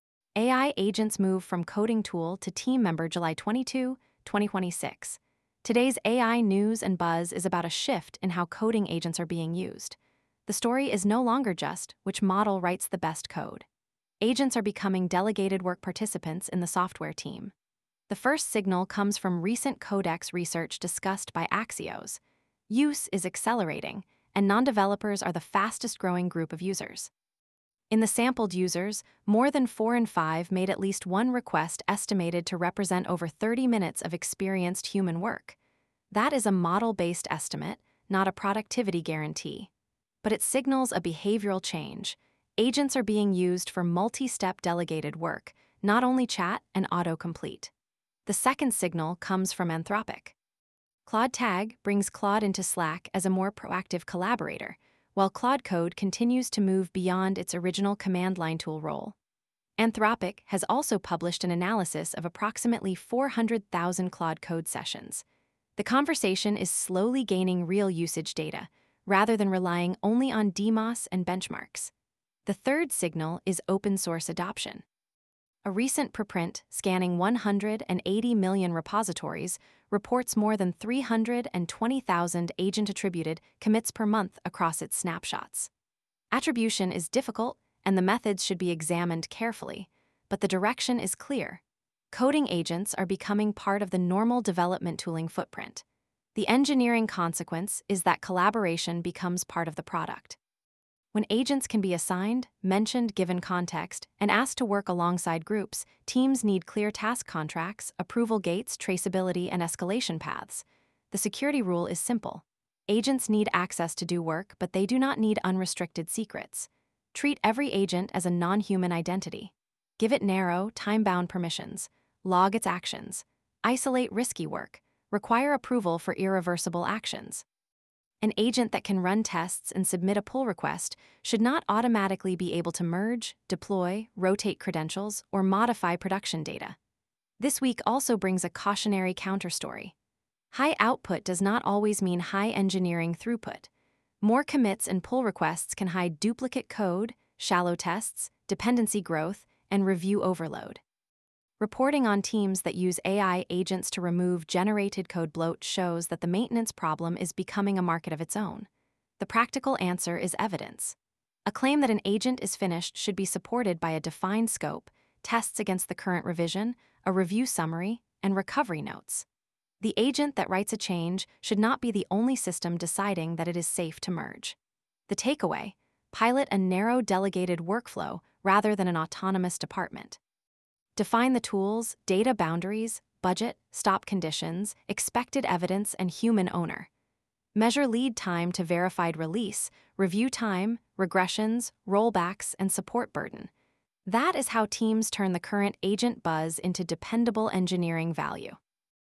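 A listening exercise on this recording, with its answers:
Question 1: What shift is driving this week's AI coding-agent buzz?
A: Agents are moving from individual coding tools toward delegated-work participants in team workflows

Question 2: What is the right security approach for an agent that needs to perform software work?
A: Give it narrow, time-bound access and log its actions

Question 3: Why are raw agent-activity metrics insufficient?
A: More commits or pull requests can hide maintenance, security, and review costs

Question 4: What should support an agent's claim that a code change is done?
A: Current evidence such as scope, tests against the revision, review summary, and recovery notes

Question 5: What should a team pilot first?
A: A narrow delegated workflow with clear ownership and stop conditions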